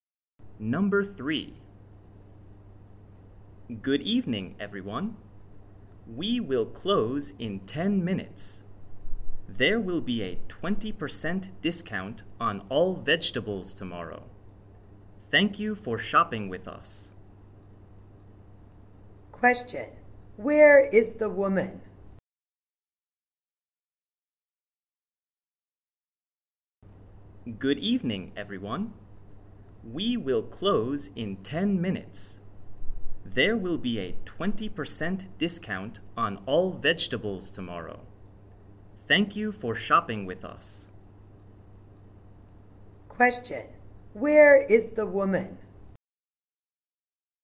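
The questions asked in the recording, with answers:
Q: Where is the woman?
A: In a store (supermarket)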